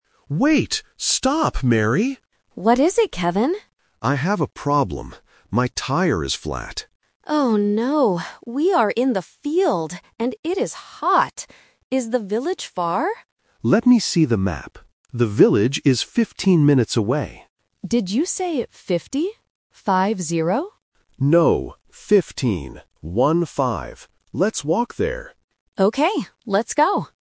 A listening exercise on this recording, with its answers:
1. What is the problem with Kevin's bike?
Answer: The tire is flat.

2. Where are they right now?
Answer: In a field

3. How many minutes does it take to walk to the village?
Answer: 15 minutes

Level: A1